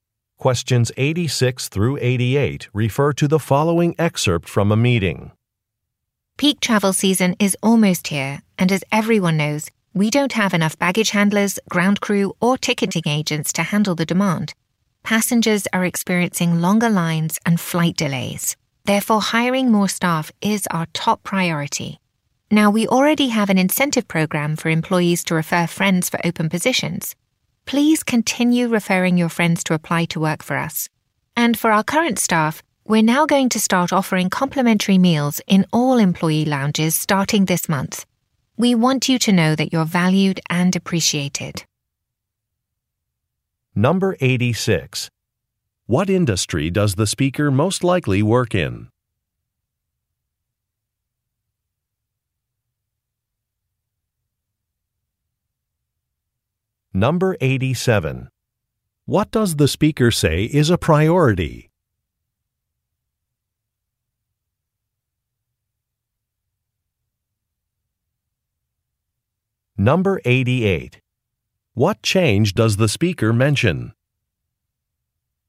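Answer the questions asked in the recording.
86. Airline
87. Hiring more staff
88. Free meals in employee lounges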